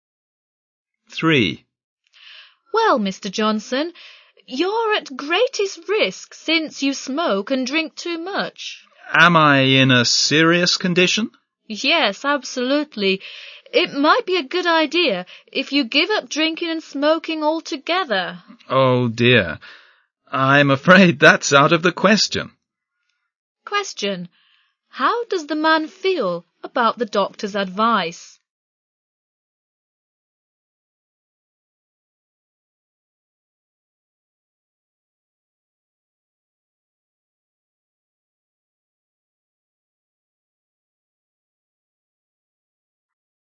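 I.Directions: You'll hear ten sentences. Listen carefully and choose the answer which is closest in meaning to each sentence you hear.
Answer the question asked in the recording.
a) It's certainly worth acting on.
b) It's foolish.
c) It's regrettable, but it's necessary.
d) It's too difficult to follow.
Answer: d) It's too difficult to follow.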